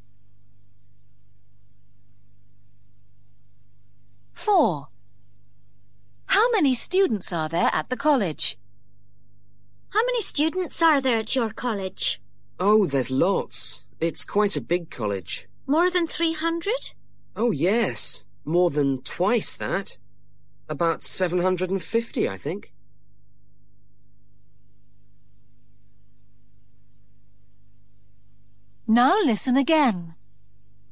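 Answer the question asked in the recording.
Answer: About 750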